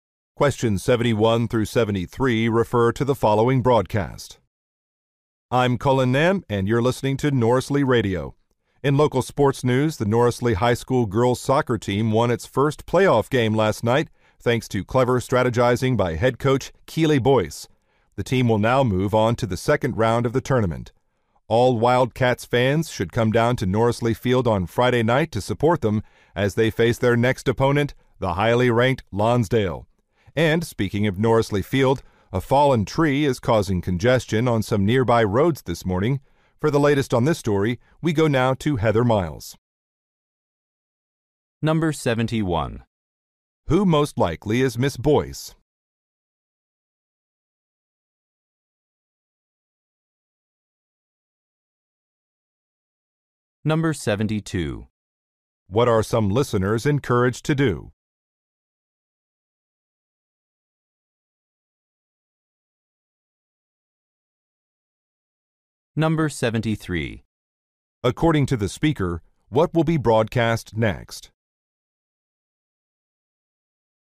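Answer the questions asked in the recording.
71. A soccer coach
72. Attend a soccer game on Friday night
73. A traffic report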